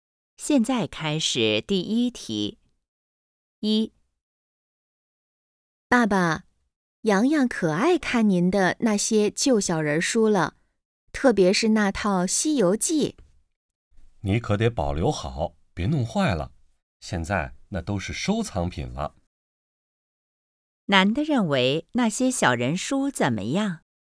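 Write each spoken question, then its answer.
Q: 男的认为那些小人书怎么样?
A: 是收藏品,要保留好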